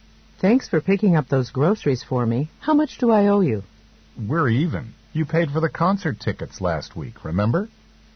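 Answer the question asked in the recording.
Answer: The woman doesn't owe him anything, because she paid for the concert tickets last week.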